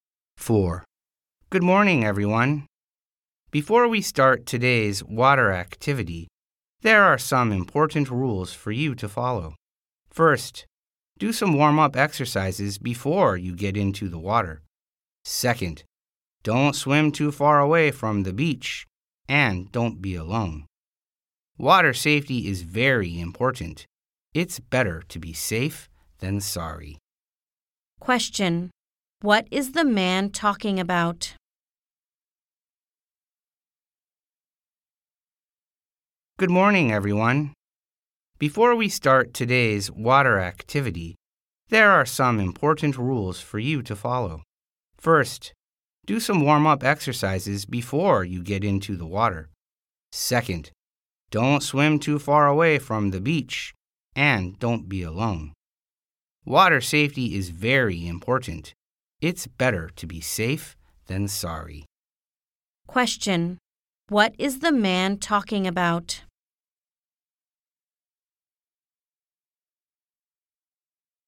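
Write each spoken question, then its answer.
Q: What is the man talking about?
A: Water safety rules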